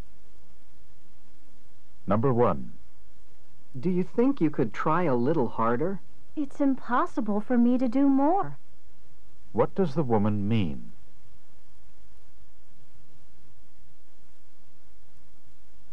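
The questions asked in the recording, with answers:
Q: What does the woman mean?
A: She can't try any harder.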